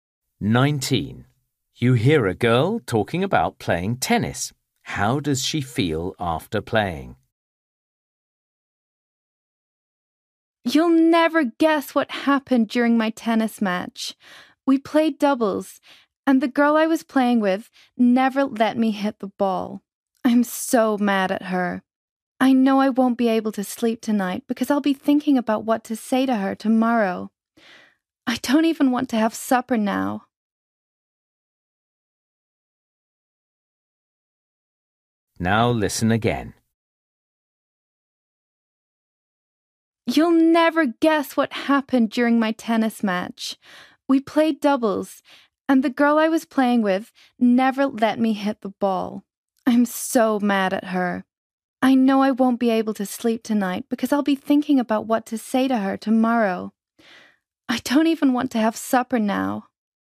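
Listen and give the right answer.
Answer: Angry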